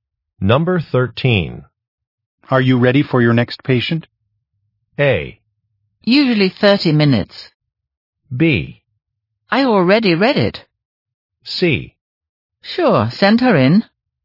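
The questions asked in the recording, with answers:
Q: Are you ready for your next patient?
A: C: Sure, send her in.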